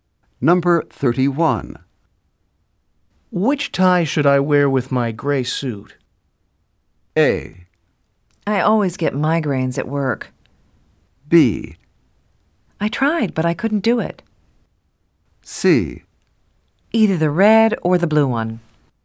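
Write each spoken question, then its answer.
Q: Which tie should I wear with my gray suit?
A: C: Either the red or the blue one.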